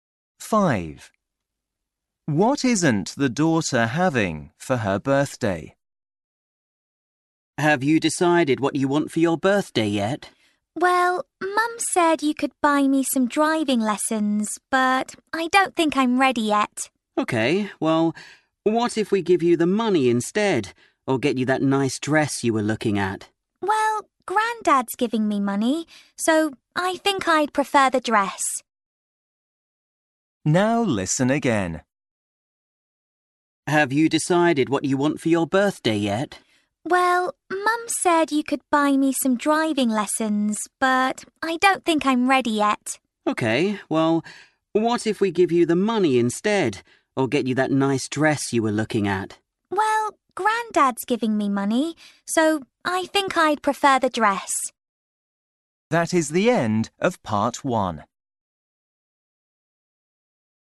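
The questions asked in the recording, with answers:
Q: What isn't the daughter having for her birthday?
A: Driving lessons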